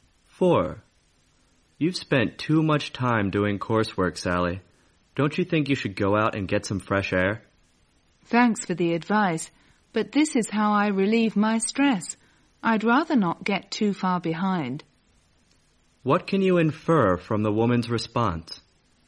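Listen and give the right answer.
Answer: She would rather keep working on her coursework; it relieves her stress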